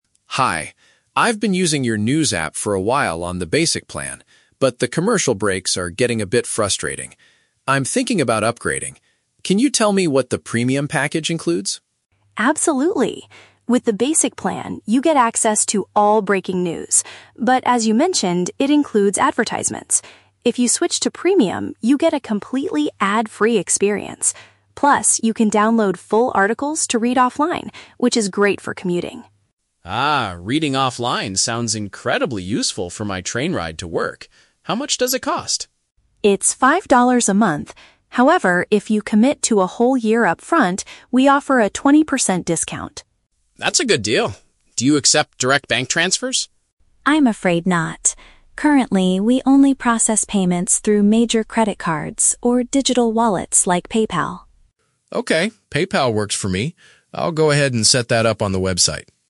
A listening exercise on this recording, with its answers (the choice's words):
Listen to a phone conversation between a customer and a service representative. Choose the correct answer (A, B, or C) for each question.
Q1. Why does the man want to change his current subscription?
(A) He is unable to access the latest breaking news stories.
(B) He wants to stop the interruptions caused by advertisements.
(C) He forgot the login password for his basic account.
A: He wants to stop the interruptions caused by advertisements.

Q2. What is a special benefit of the Premium package?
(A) It allows users to save texts to read without an internet connection.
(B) It includes a free monthly train ticket for commuters.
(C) Users can listen to an audio version of the news articles.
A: It allows users to save texts to read without an internet connection.

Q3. How will the customer most likely pay for his new plan?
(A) By sending money directly from his bank account.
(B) By paying cash at a local convenience store.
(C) By using an online payment system.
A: By using an online payment system.

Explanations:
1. Mark says the "commercial breaks are getting a bit frustrating" and he wants an "ad-free experience". Option B paraphrases this (interruptions caused by advertisements = commercial breaks). Option A is the Trap: The representative mentions "breaking news", but she says the basic plan already gives him access to it. Option C is a common tech issue but is never mentioned.
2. Sarah explains that with Premium, you can "download full articles to read offline". Option A perfectly paraphrases this (save texts = download full articles; without an internet connection = offline). Option B is the Trap: The words "train ride" and "commuting" are used in the audio, but the app does not give away free train tickets. Option C is a plausible feature for a news app, but it is not mentioned here.
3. Sarah says they accept "digital wallets like PayPal," and Mark agrees that "PayPal works for me". Option C uses a broader synonym (online payment system = digital wallets / PayPal). Option A is the Trap: Mark asks about "direct bank transfers", but Sarah explicitly rejects it ("I'm afraid not"). Option B is not mentioned.

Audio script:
Mark: Hi, I've been using your news app for a while on the basic plan, but the commercial breaks are getting a bit frustrating. I'm thinking about upgrading. Can you tell me what the Premium package includes?
Sarah: Absolutely! With the basic plan, you get access to all breaking news, but as you mentioned, it includes advertisements. If you switch to Premium, you get a completely ad-free experience. Plus, you can download full articles to read offline, which is great for commuting.
Mark: Ah, reading offline sounds incredibly useful for my train ride to work. How much does it cost?
Sarah: It's five dollars a month. However, if you commit to a whole year upfront, we offer a twenty percent discount.
Mark: That's a good deal. Do you accept direct bank transfers?
Sarah: I'm afraid not. Currently, we only process payments through major credit cards or digital wallets like PayPal.